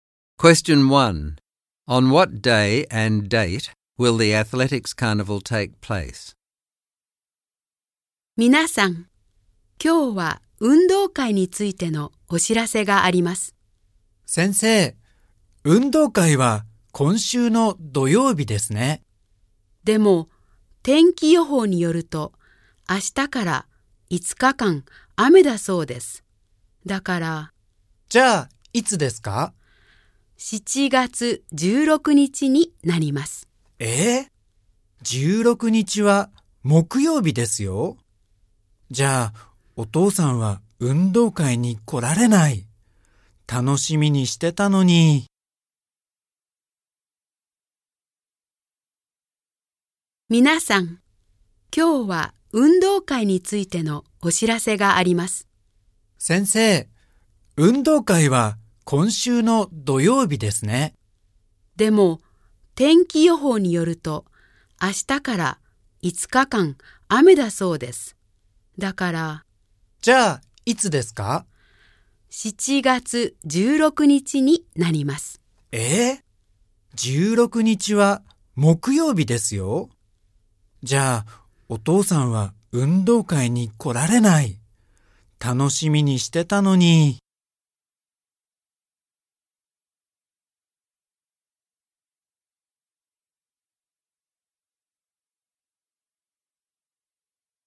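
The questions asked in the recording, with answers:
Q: On what day and date will the athletics carnival take place?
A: Thursday, 16 July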